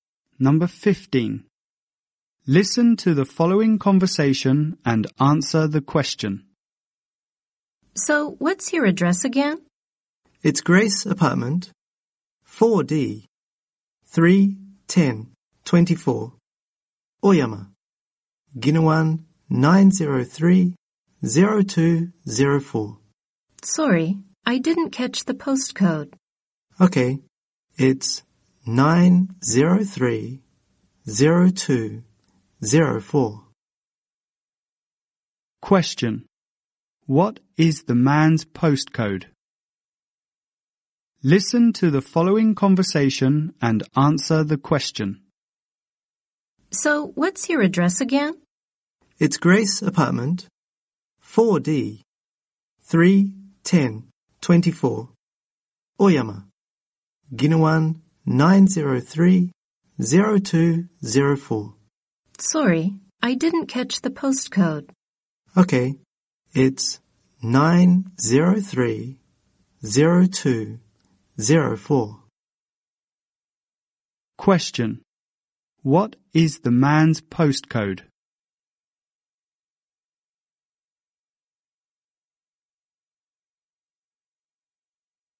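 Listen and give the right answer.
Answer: 903-0204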